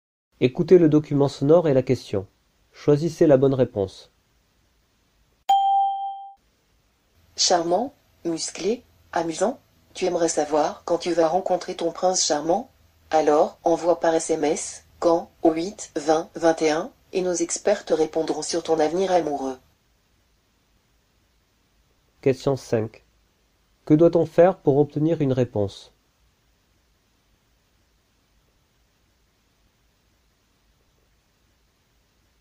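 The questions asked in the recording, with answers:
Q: Que doit-on faire pour obtenir une réponse?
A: Envoyer « quand » par SMS au 8 20 21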